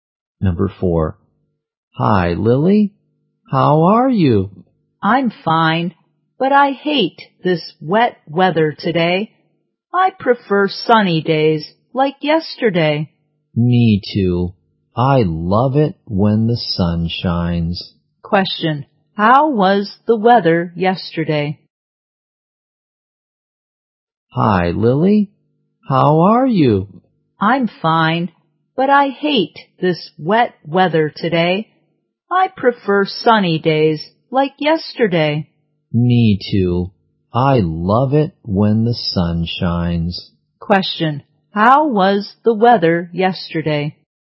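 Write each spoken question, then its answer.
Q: how was the weather yesterday?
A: Sunny.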